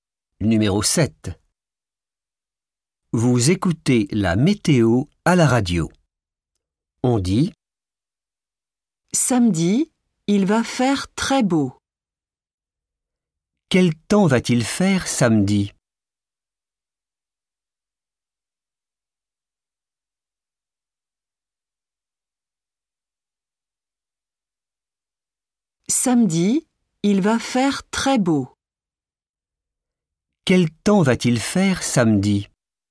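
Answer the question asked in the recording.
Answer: très beau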